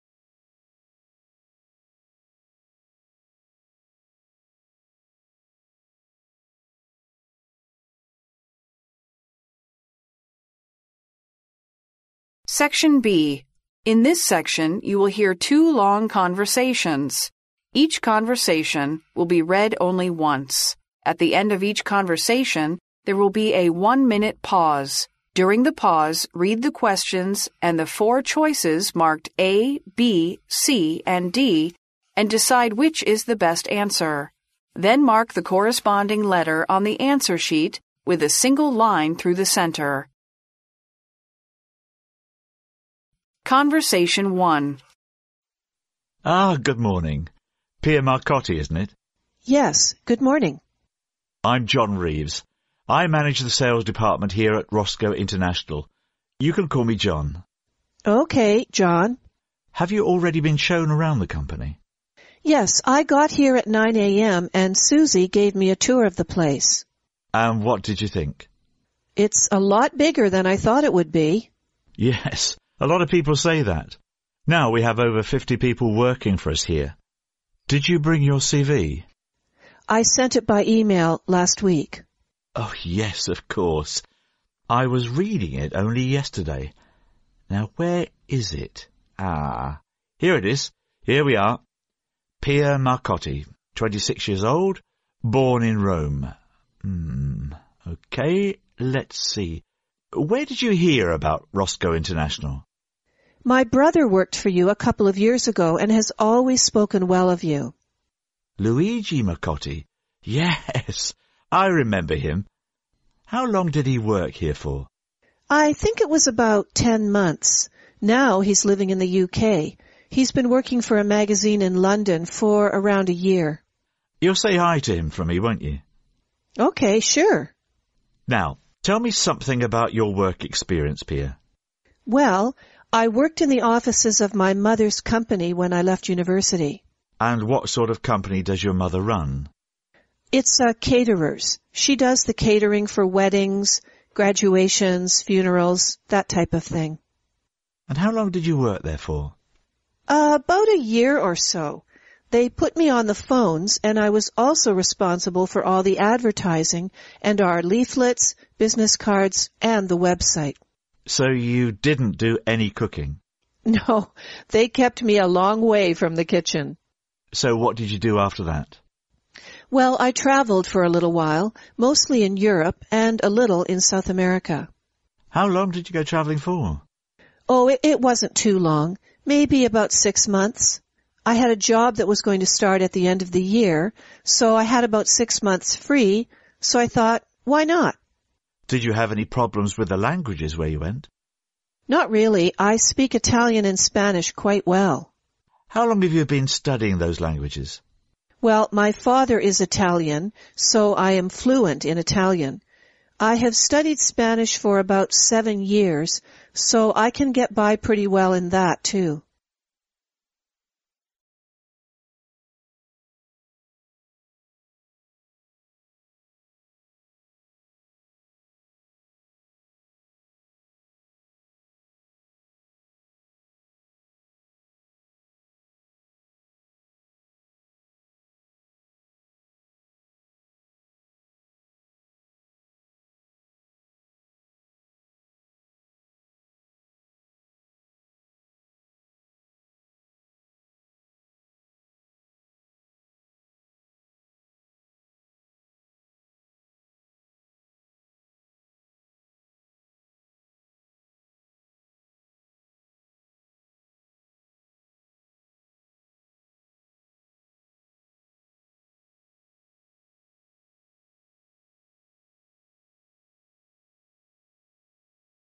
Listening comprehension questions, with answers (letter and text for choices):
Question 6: How many staff members are working at the Rosco International?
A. Forty.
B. Fifty.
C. Sixty.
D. Seventy.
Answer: B. Fifty.

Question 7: Where did Pia hear about Rosco International?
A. From a TV commercial.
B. From a magazine.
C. From her brother.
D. From a friend of hers.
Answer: C. From her brother.

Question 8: How long did Pia go traveling in Europe and South America?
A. Six months.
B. Six weeks.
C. Seven months.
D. Seven weeks.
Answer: A. Six months.

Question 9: What languages does Pia speak?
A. Italian and French.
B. Italian and Spanish.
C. German and French.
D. French and Spanish.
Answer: B. Italian and Spanish.

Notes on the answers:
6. 当Pia谈到公司比自己原本想象中要大时,John便说到现在公司在职员工有50人,故答案选B。
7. 当Pia被问到从哪里得知Rosco International这个公司时,她回答"My brother worked for you a couple of years ago(我哥哥几年前在你们公司工作过)"。所以答案选C。
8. 在Pia谈及自己过去在欧洲和南美洲的一次旅行时,John问她旅行了多久,她答道:"It wasn't too long. Maybe about six months",所以答案选A。
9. Pia在欧洲和南美旅行期间基本上交流无障碍,因为她"speak Italian and Spanish quite well",所以答案选B。